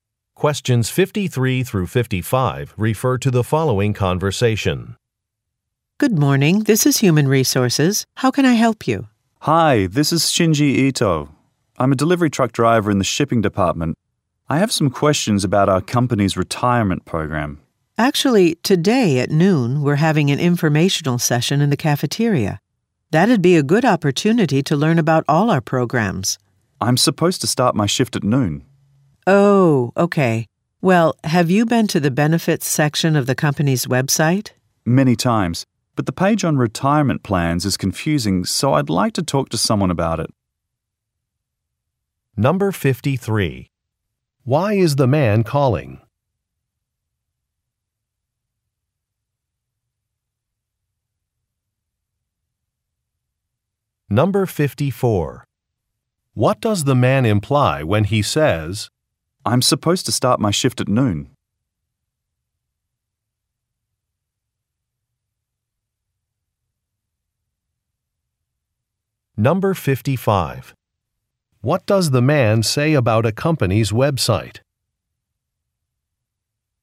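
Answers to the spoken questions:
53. To ask about the company's retirement program
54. He cannot attend the information session
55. The retirement plan page is confusing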